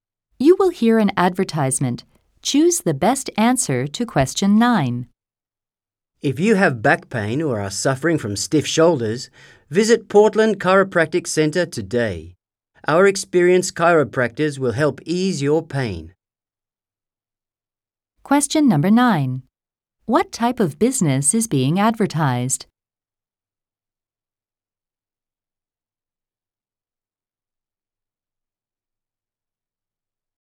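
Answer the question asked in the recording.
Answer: A chiropractic center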